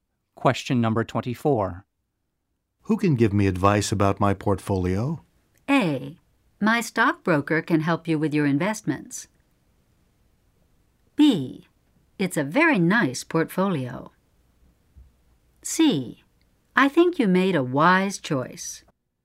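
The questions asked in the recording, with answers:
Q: Who can give me advice about my portfolio?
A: A: My stockbroker can help you with your investments.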